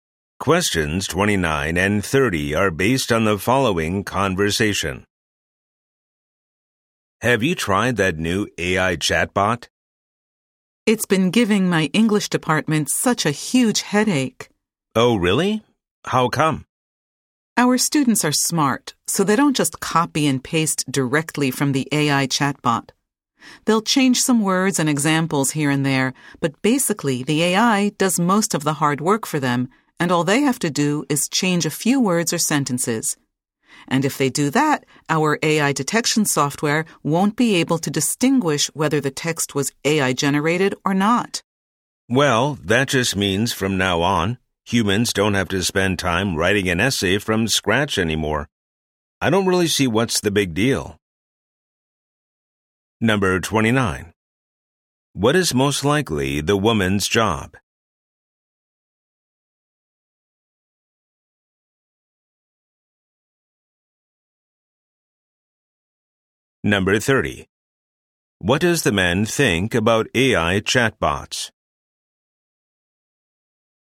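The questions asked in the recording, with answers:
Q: What is most likely the woman's job?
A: A teacher in an English department

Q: What does the man think about AI chatbots?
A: He doesn't see them as a big deal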